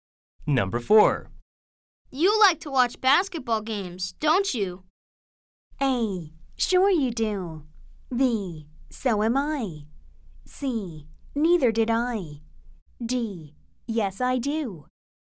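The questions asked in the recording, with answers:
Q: You like to watch basketball games, don't you?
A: D: Yes, I do.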